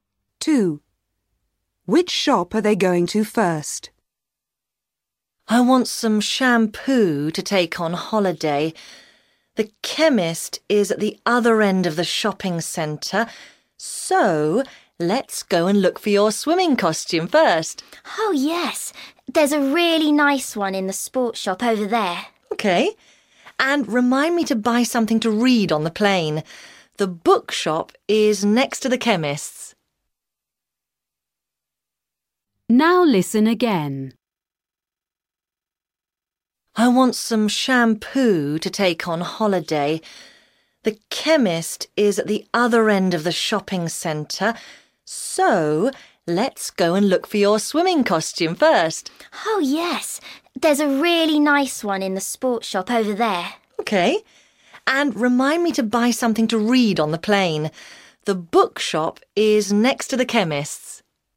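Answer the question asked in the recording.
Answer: The sports shop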